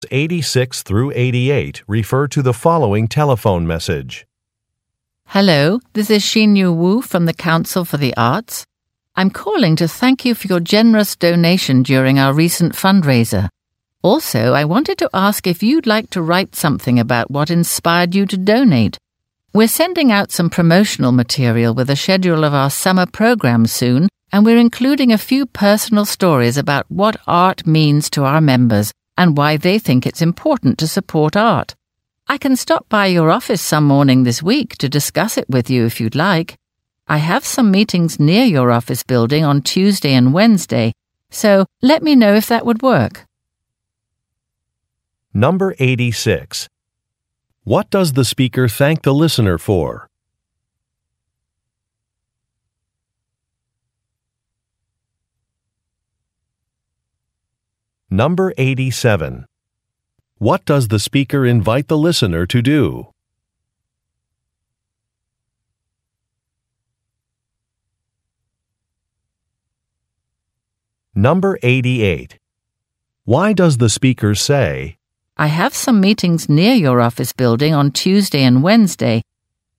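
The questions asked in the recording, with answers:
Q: What does the speaker thank the listener for?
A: Making a generous donation during the recent fundraiser

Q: What does the speaker invite the listener to do?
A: Write something about what inspired them to donate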